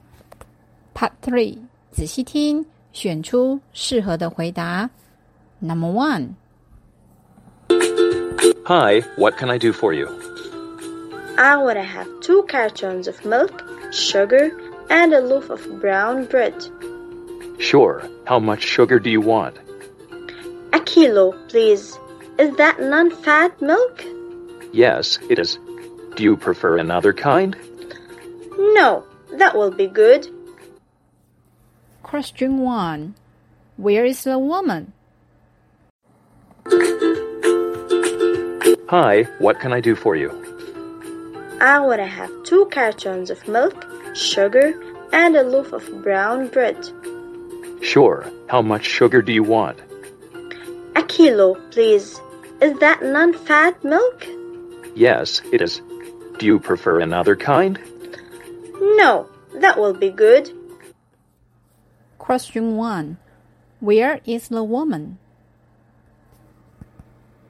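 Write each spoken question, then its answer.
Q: Where is the woman?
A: At a store (grocery store)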